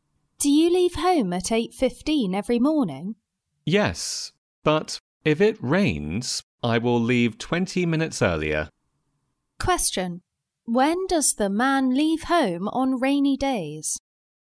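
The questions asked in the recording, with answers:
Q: When does the man leave home on rainy days?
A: At 7:55 (20 minutes earlier than 8:15)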